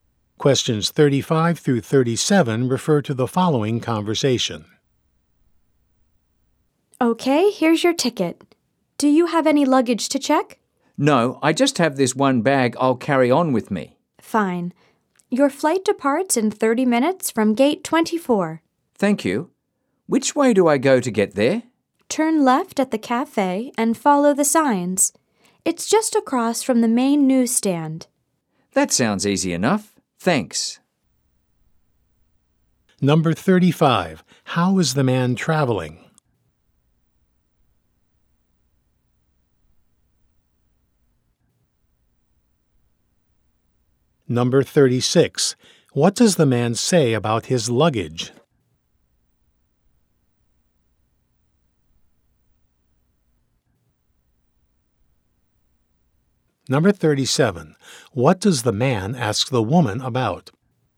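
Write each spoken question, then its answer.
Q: How is the man traveling?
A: By plane

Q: What does the man say about his luggage?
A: He will carry on one bag

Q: What does the man ask the woman about?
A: How to get to the gate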